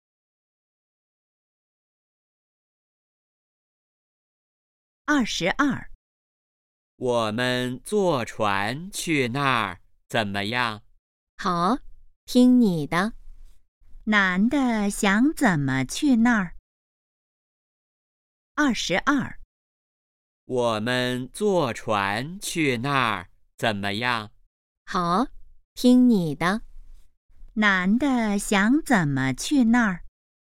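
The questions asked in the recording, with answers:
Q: 男的想怎么去那儿?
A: 坐船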